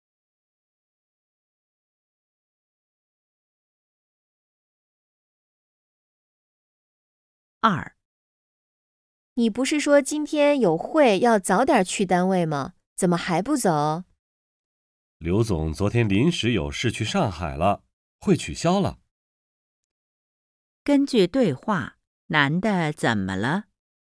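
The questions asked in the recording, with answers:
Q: 根据对话,男的怎么了?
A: 会取消了,不用早去单位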